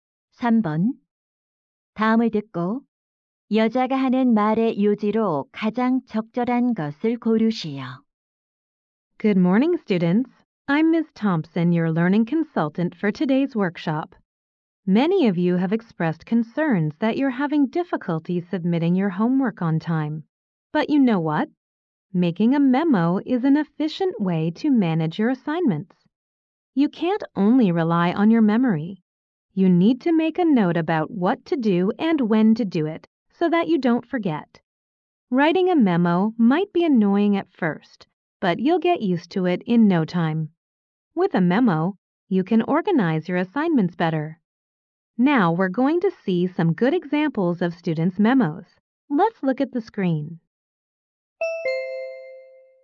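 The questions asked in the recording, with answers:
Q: 다음을 듣고 여자가 하는 말의 요지로 가장 적절한 것을 고르시오.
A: 메모를 하면 과제를 효율적으로 관리할 수 있다.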